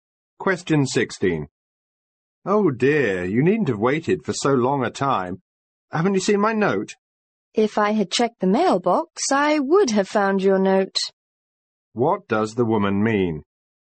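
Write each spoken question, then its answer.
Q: What does the woman mean?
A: She didn't check the mailbox, so she didn't see the note.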